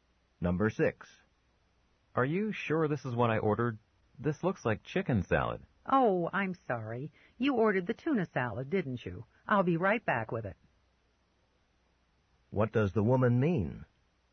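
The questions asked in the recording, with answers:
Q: What does the woman mean?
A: She brought the wrong order and will bring the tuna salad.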